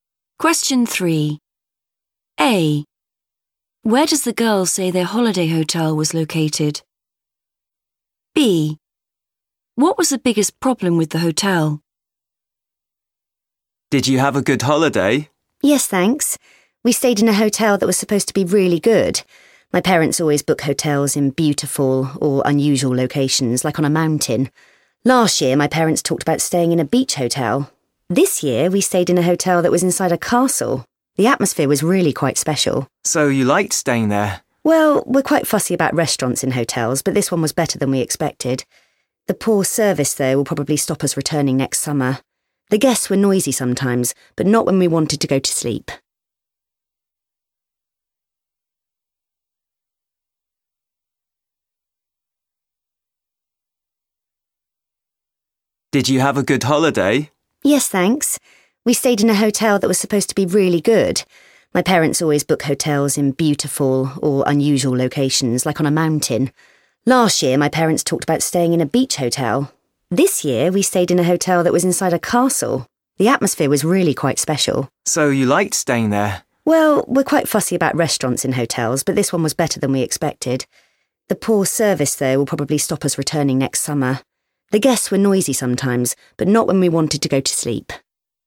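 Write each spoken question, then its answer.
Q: Where does the girl say their holiday hotel was located?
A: inside a castle

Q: What was the biggest problem with the hotel?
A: poor service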